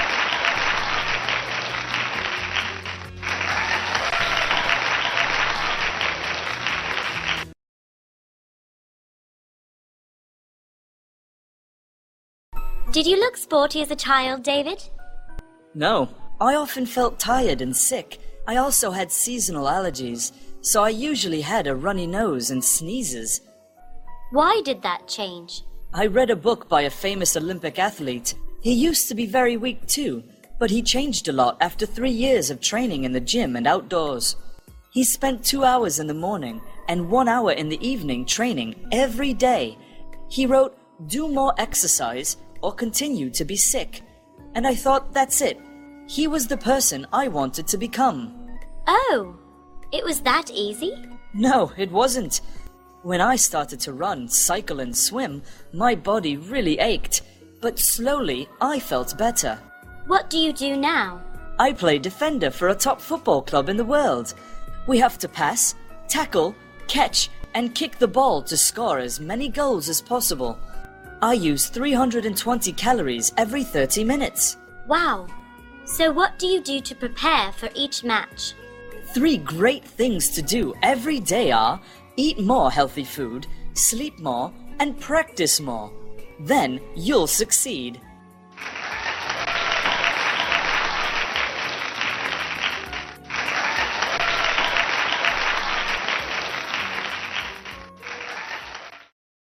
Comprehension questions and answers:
Task: Decide if each sentence is True (T) or False (F).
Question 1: David was always healthy when he was a child.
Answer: False

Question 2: He was inspired by an Olympic athlete's book.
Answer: True

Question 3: He trains only once a day.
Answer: False

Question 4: Now, he plays for a football club.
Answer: True

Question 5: He advises people to eat, sleep, and practice more.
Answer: True

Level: lớp 7